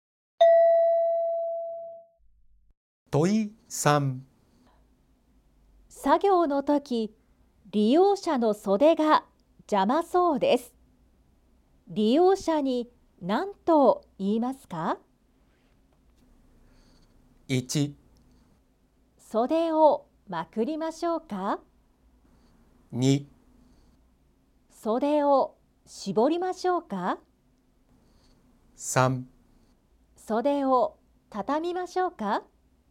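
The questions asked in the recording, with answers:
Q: 作業の時、利用者の袖が邪魔そうです。利用者に何と言いますか?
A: 1: 袖をまくりましょうか。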